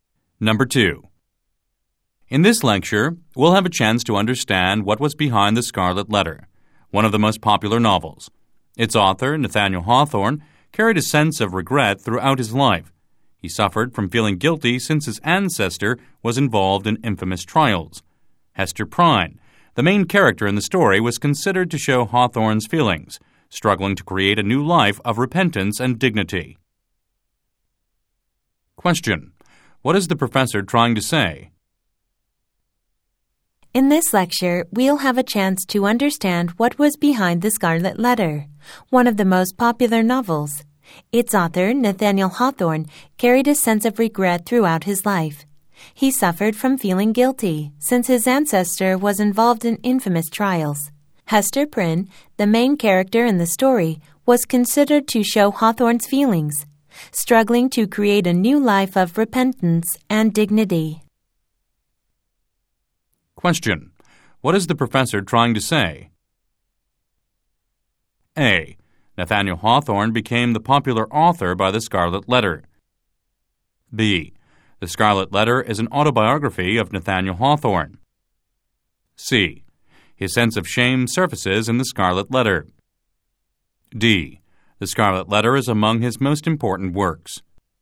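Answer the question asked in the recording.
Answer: C: His sense of shame surfaces in The Scarlet Letter.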